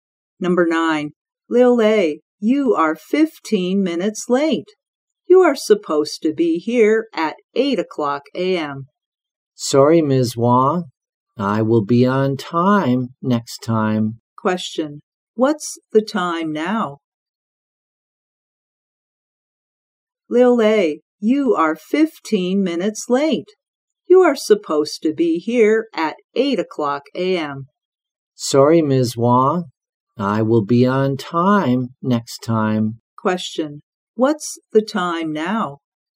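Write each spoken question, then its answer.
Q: What's the time now?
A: 8:15 a.m.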